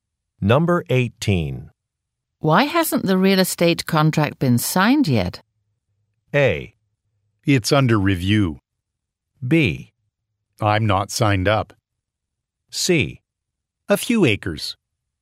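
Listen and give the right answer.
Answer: A: It's under review.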